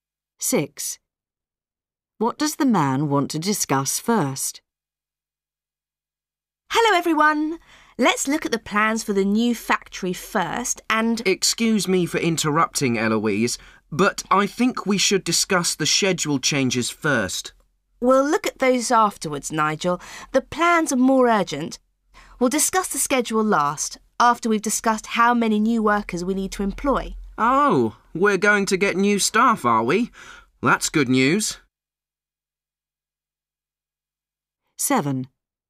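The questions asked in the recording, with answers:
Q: What does the man want to discuss first?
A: The schedule changes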